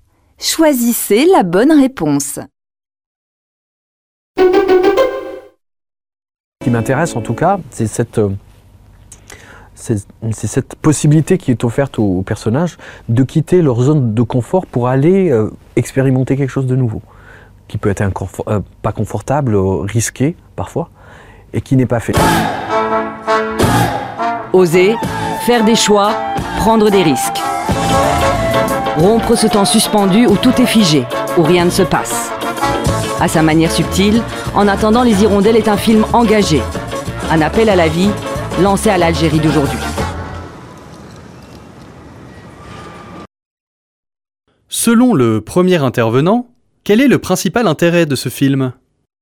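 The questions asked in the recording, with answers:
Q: Selon le premier intervenant, quel est le principal intérêt de ce film ?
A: Les personnages peuvent quitter leur zone de confort pour expérimenter quelque chose de nouveau, parfois risqué.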